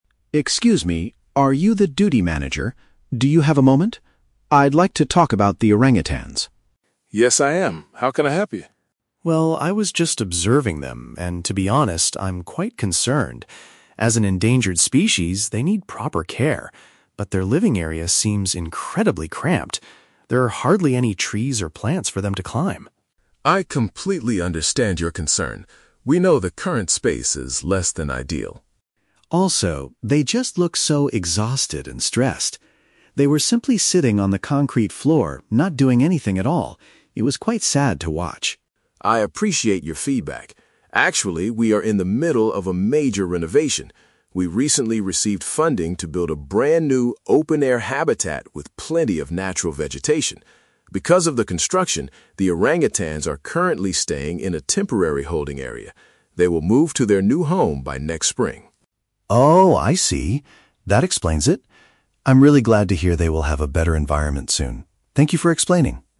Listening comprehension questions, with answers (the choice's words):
Listen to a conversation between a zoo visitor and a manager. Choose the best answer (A, B, or C) for each question.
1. Why is the visitor speaking to the zoo manager?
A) To suggest buying a new type of endangered monkey.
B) To express dissatisfaction with how a rare animal is being kept.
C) To ask for directions to the new open-air animal habitat.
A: To express dissatisfaction with how a rare animal is being kept.

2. What specific details does the visitor notice about the orangutans?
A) They appear very tired and lack natural things to climb on.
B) They are actively playing together on the concrete floor.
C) They are fighting with each other because the space is small.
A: They appear very tired and lack natural things to climb on.

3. What is the manager's explanation for the current situation?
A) The zoo does not have enough money to buy large trees right now.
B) The orangutans are sick and need to stay in a special medical room.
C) The animals are being kept in a short-term cage while a new one is built.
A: The animals are being kept in a short-term cage while a new one is built.

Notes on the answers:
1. The visitor states that she is "concerned" because the living area is "cramped." Option B paraphrases this as expressing "dissatisfaction with how a rare animal is being kept." Why the trap is wrong: Option (C) is a trap. The "open-air habitat" is mentioned later by the manager as a future plan, but the visitor is not asking for directions to it. Option (A) is not mentioned.
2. The visitor points out that there are "hardly any trees or plants for them to climb" and they look "exhausted." Option A uses synonyms: "tired" (exhausted) and "lack natural things" (hardly any trees). Why the trap is wrong: Option (B) is a trap. The "concrete floor" is mentioned, but the visitor explicitly says they were "not doing anything at all," so they are not "actively playing." Option (C) is a plausible guess for animals in small spaces, but it is not mentioned.
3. The manager explains that they are "in the middle of a major renovation" and the animals are in a "temporary holding area." Option C paraphrases this as a "short-term cage while a new one is built." Why the trap is wrong: Option (A) is a trap. The manager mentions the word "funding" (money), but says they "recently received funding" to build a better place, meaning they do have money now. Option (B) is not mentioned.

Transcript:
Visitor: Excuse me, are you the duty manager? Do you have a moment? I'd like to talk about the orangutans.
Manager: Yes, I am. How can I help you?
Visitor: Well, I was just observing them, and to be honest, I'm quite concerned. As an endangered species, they need proper care. But their living area seems incredibly cramped. There are hardly any trees or plants for them to climb.
Manager: I completely understand your concern. We know the current space is less than ideal.
Visitor: Also, they just look so exhausted and stressed. They were simply sitting on the concrete floor, not doing anything at all. It was quite sad to watch.
Manager: I appreciate your feedback. Actually, we are in the middle of a major renovation. We recently received funding to build a brand-new, open-air habitat with plenty of natural vegetation. Because of the construction, the orangutans are currently staying in a temporary holding area. They will move to their new home by next spring.
Visitor: Oh, I see. That explains it. I'm really glad to hear they will have a better environment soon. Thank you for explaining.